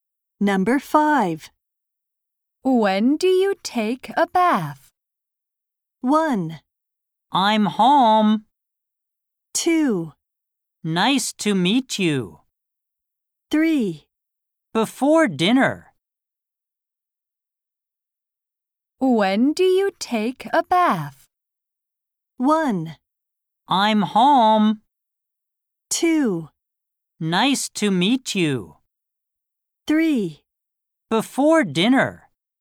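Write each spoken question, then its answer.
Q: When do you take a bath?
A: 3: Before dinner.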